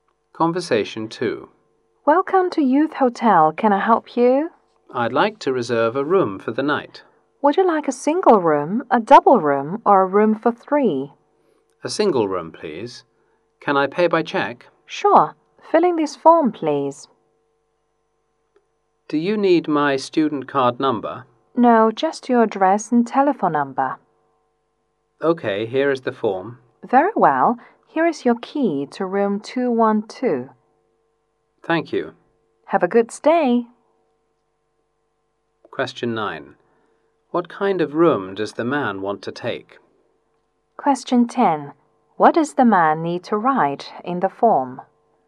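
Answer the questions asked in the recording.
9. A single room
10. His address and telephone number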